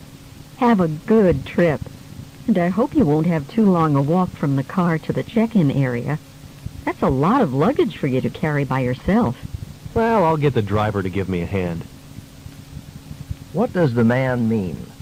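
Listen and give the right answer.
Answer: The driver will help him carry his luggage.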